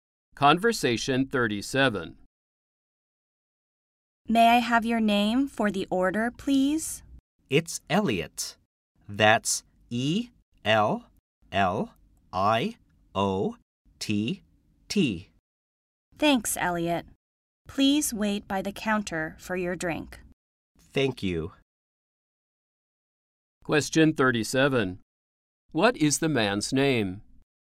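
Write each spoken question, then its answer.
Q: What is the man's name?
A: Elliott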